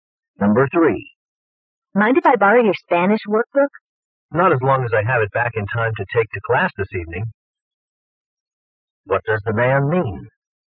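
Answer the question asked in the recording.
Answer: She can borrow it if she returns it before his class this evening.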